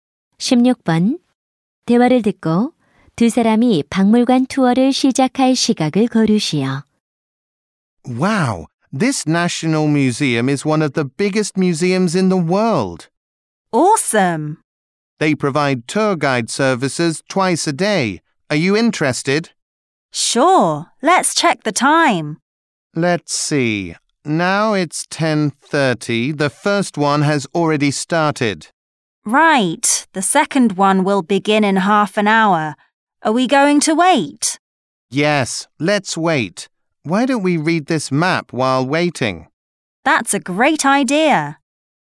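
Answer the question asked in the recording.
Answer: 11시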